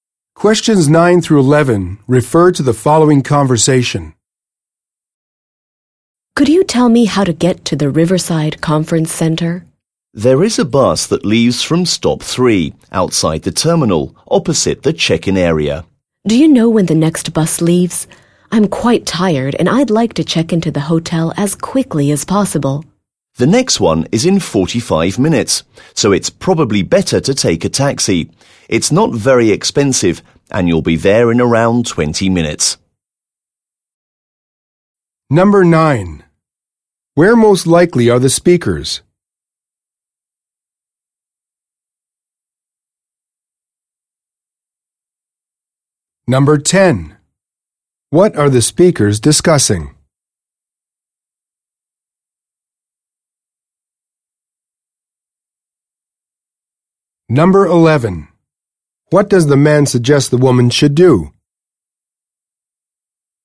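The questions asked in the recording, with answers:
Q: Where most likely are the speakers?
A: At an airport

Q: What are the speakers discussing?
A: How to get to the Riverside Conference Center

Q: What does the man suggest the woman should do?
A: Take a taxi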